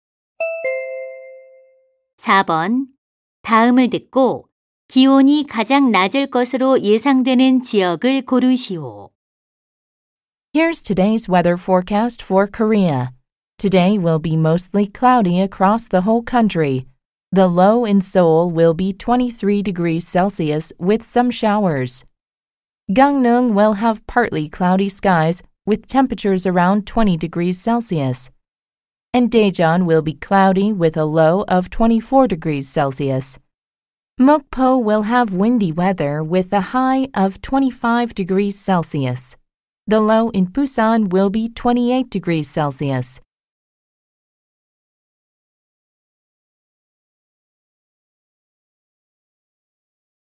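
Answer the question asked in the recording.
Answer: 강릉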